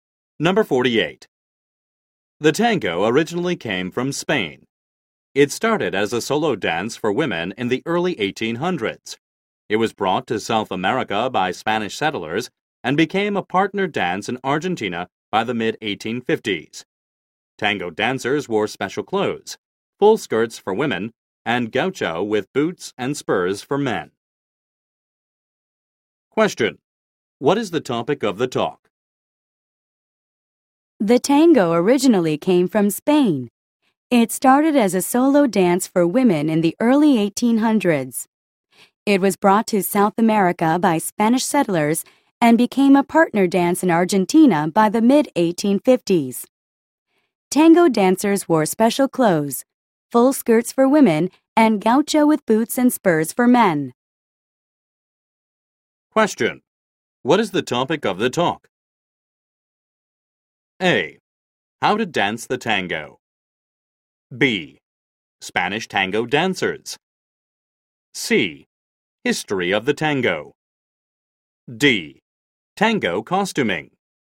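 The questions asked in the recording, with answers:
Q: What is the topic of the talk?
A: C: History of the tango.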